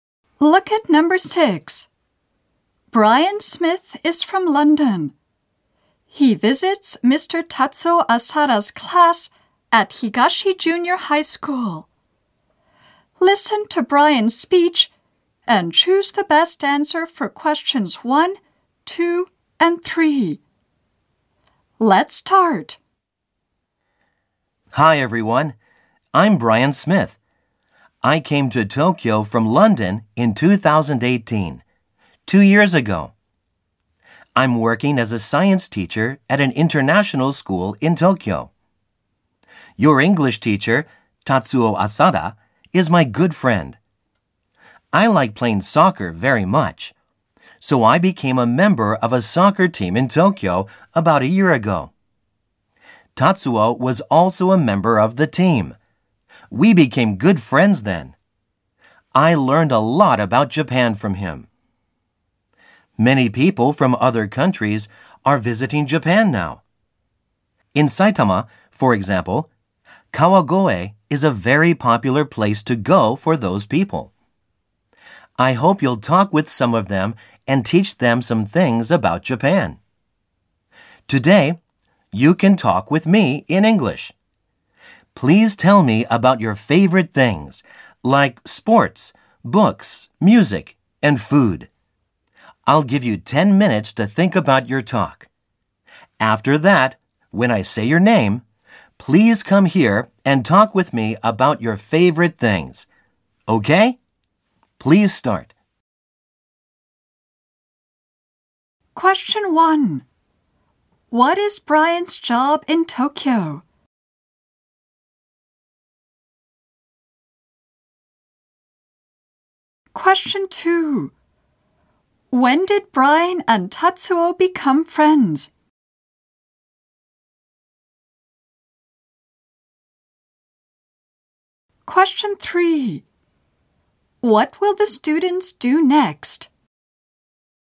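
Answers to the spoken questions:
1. He is a science teacher at an international school.
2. About a year ago, when Brian joined their soccer team.
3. They will spend 10 minutes thinking about what to say about their favorite things.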